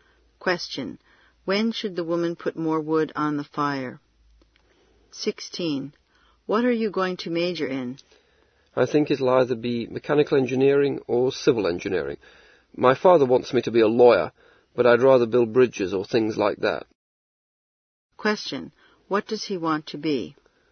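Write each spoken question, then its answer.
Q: What does he want to be?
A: An engineer who builds bridges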